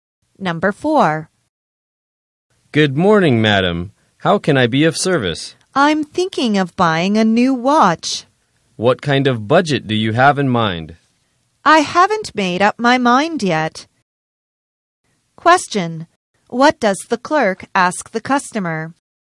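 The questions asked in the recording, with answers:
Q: What does the clerk ask the customer?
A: What kind of budget the customer has in mind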